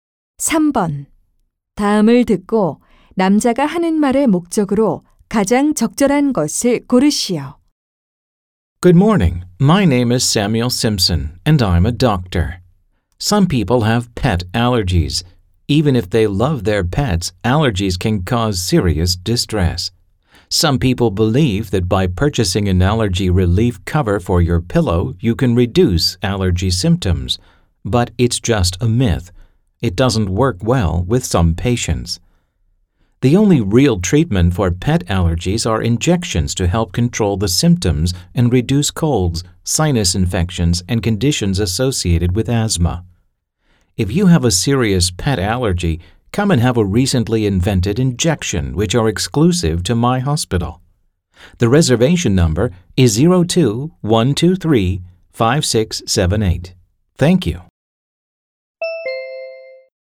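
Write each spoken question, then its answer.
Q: 다음을 듣고 남자가 하는 말의 목적으로 가장 적절한 것을 고르시오.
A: 반려동물 알레르기 주사 치료를 홍보하려고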